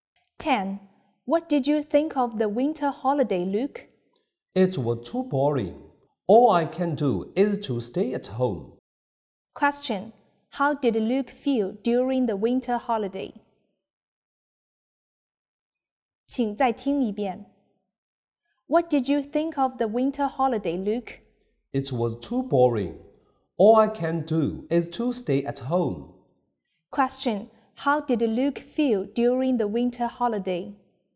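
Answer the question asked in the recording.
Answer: Bored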